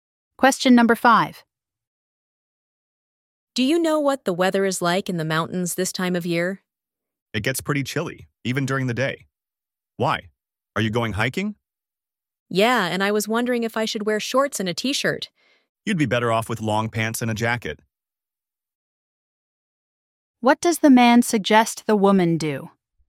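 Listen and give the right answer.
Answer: Wear long pants and a jacket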